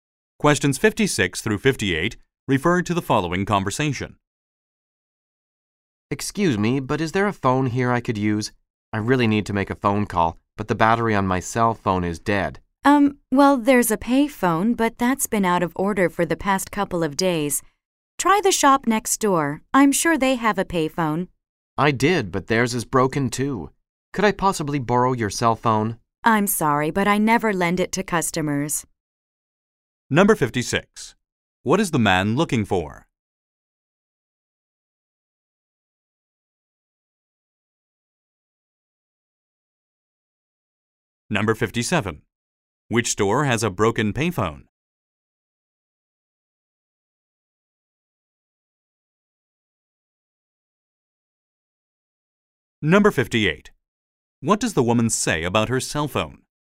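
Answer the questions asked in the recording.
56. A phone
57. The shop next door
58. She never lends it to customers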